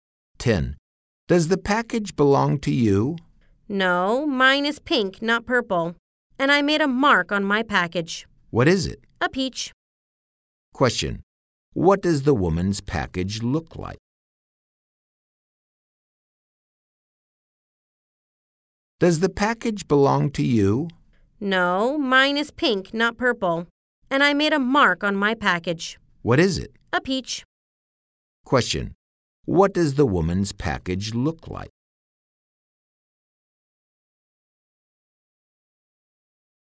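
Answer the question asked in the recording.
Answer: It is pink with a peach mark on it.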